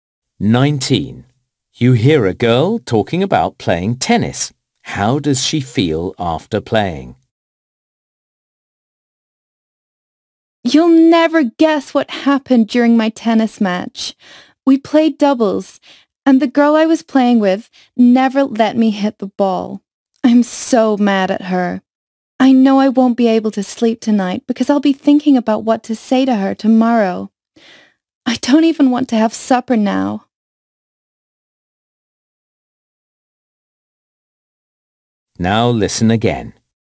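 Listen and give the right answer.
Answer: Angry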